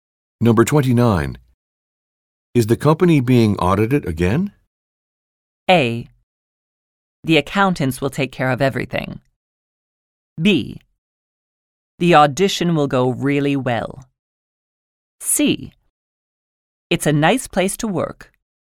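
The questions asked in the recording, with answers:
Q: Is the company being audited again?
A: A: The accountants will take care of everything.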